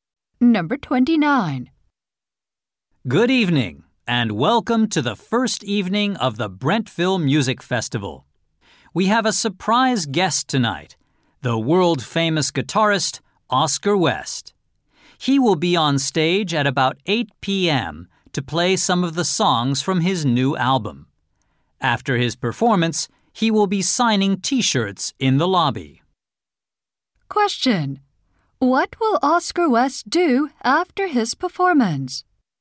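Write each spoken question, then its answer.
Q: What will Oscar West do after his performance?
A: Sign T-shirts in the lobby.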